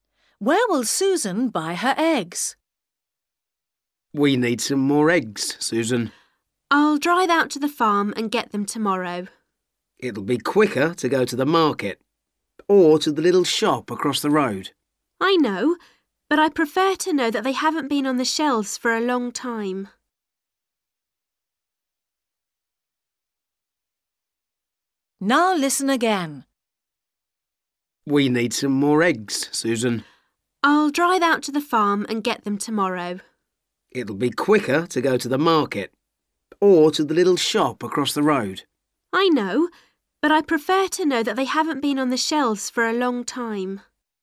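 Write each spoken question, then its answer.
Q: Where will Susan buy her eggs?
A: At the farm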